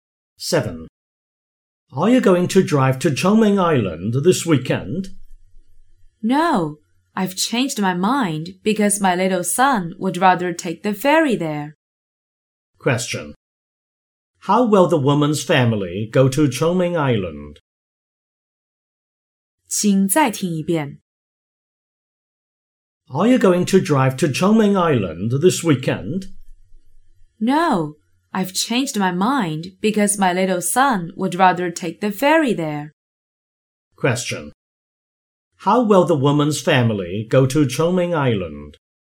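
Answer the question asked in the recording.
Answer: By ferry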